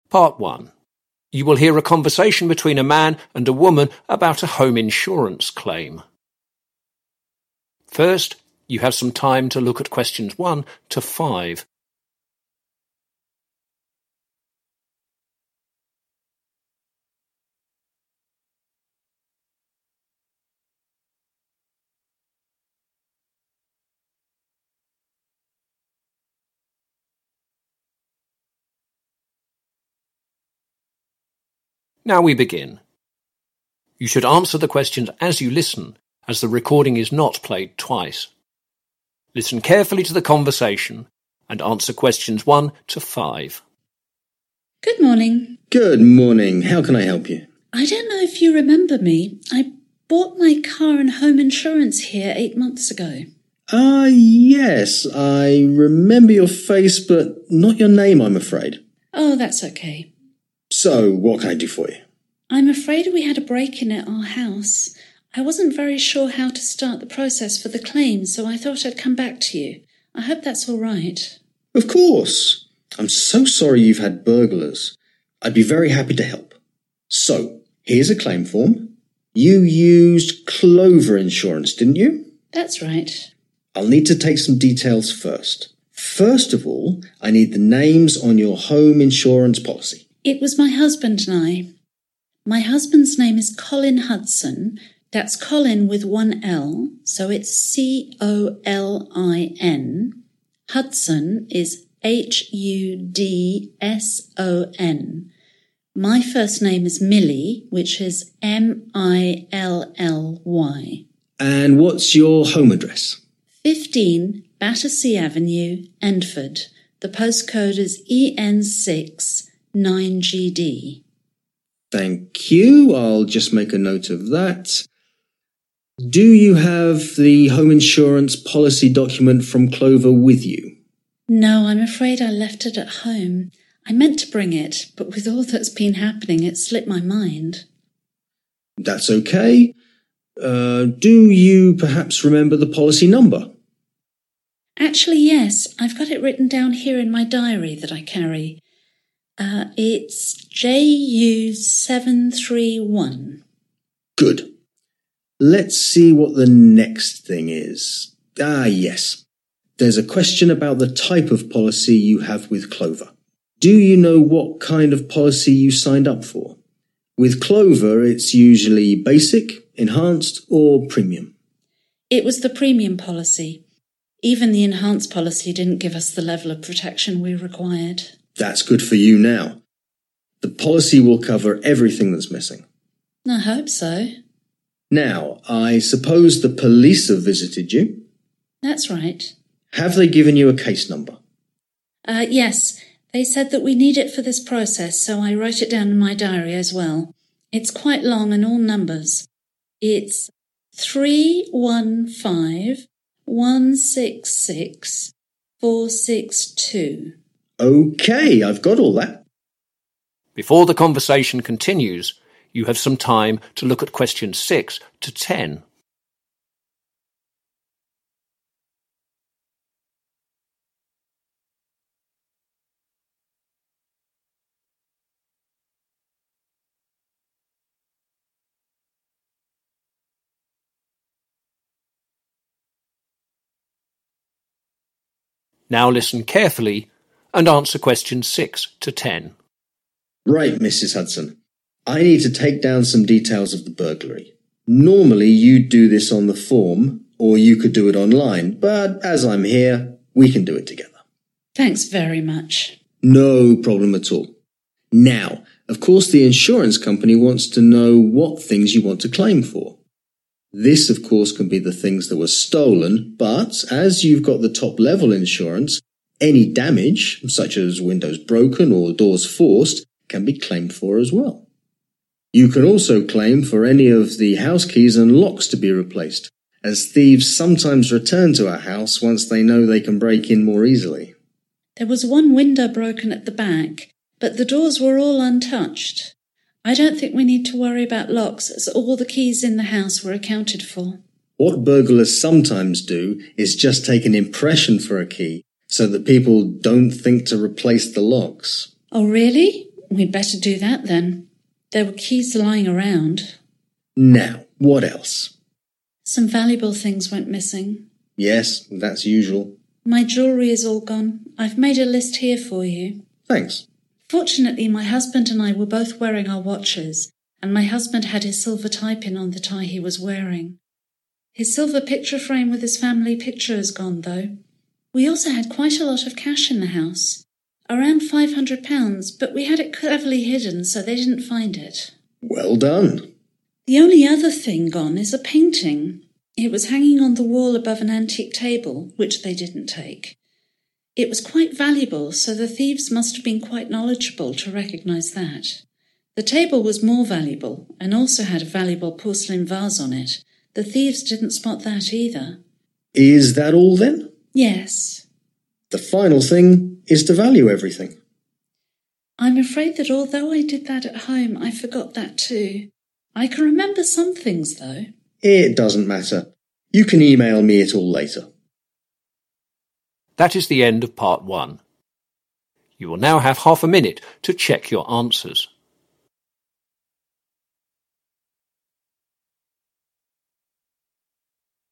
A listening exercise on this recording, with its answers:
Complete the house insurance claim form below. Write NO MORE THAN THREE WORDS AND/OR A NUMBER from the listening for each answer.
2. Address: (2).................. Battersea Avenue, Endford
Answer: 15

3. Policy Number: (3)..................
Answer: JU 731

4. Type of Policy: (4)..................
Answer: Premium (policy)

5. Police Case Number: 315 166 (5)..................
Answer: 462